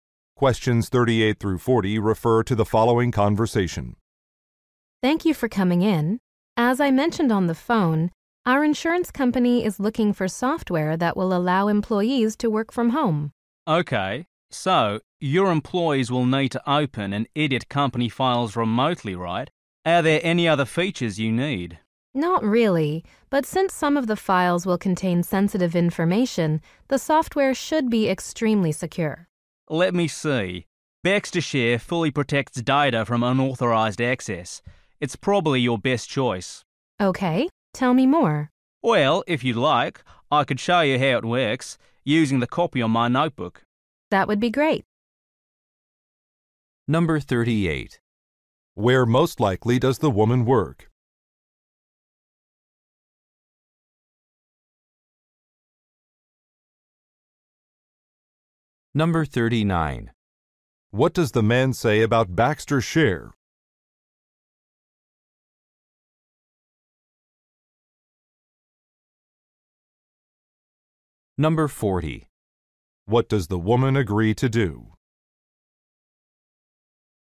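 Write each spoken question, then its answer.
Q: Where most likely does the woman work?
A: At an insurance company.

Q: What does the man say about BaxterShare?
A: It fully protects data from unauthorized access.

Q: What does the woman agree to do?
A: Watch a demonstration of the software.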